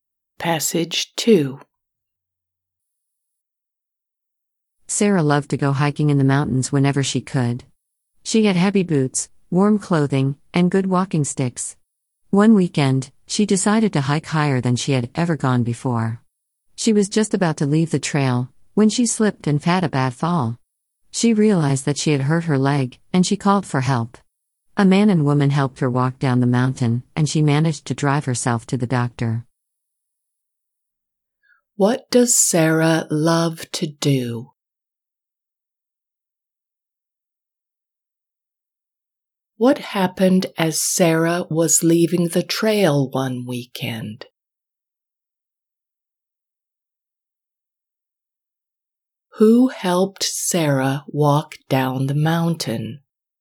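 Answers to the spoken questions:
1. hike in the mountains
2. she slipped and fell, hurting her leg
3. a man and a woman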